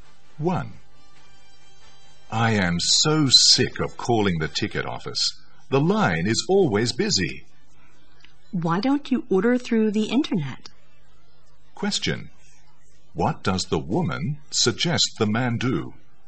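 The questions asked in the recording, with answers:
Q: What does the woman suggest the man do?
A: Order the tickets through the internet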